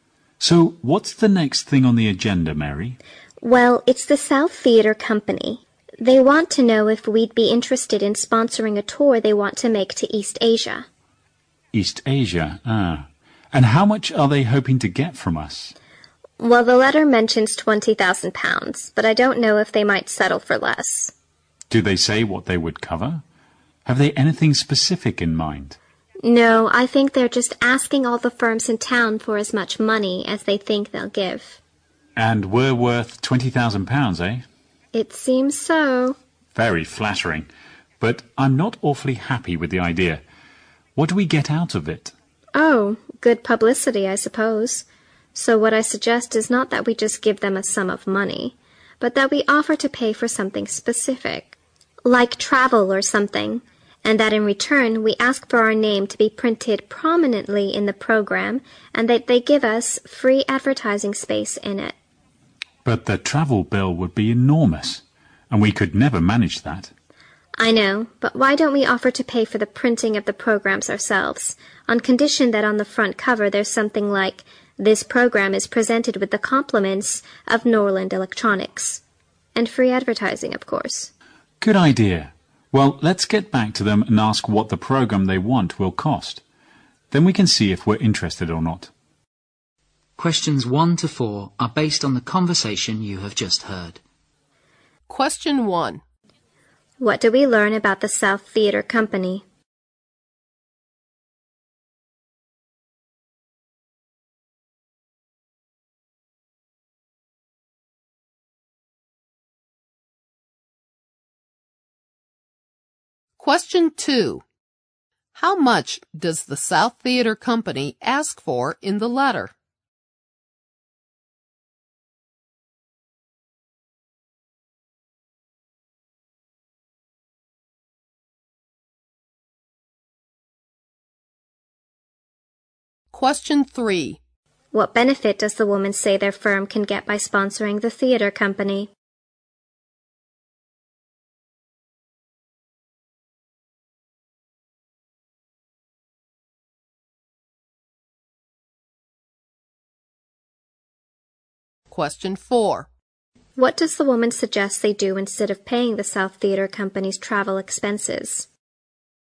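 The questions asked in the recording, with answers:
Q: What do we learn about the South Theatre Company?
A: It wants sponsorship for a tour to East Asia.

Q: How much does the South Theatre Company ask for in the letter?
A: £20,000

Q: What benefit does the woman say their firm can get by sponsoring the theatre company?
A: Good publicity.

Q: What does the woman suggest they do instead of paying the South Theatre Company's travel expenses?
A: Pay for printing the programs.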